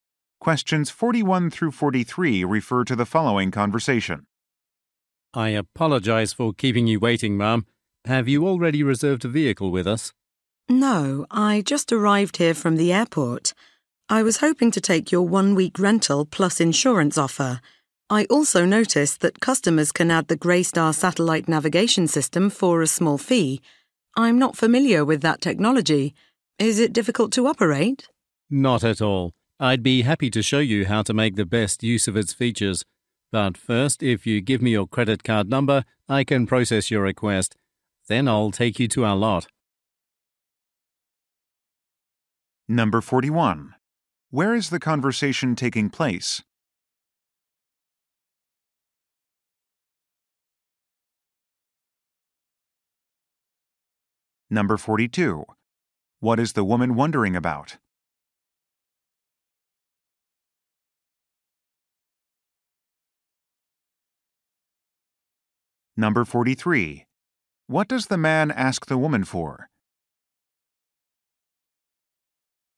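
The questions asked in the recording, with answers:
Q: Where is the conversation taking place?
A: At a car rental agency.

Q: What is the woman wondering about?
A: Whether the navigation system is difficult to use.

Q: What does the man ask the woman for?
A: Her credit card number.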